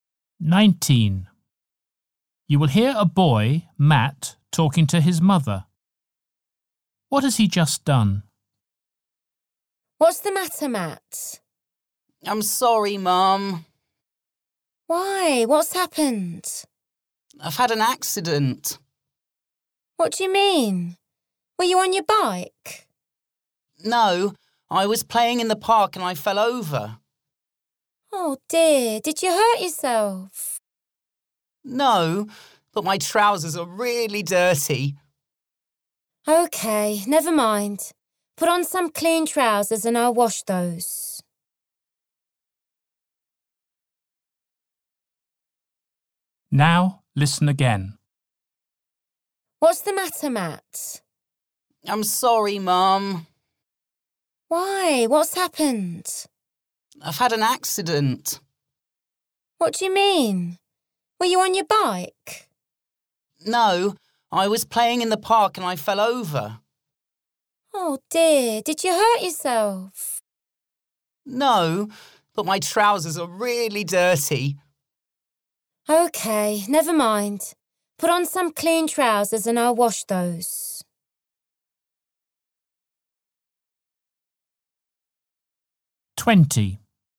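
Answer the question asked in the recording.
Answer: He fell over in the park and got his trousers dirty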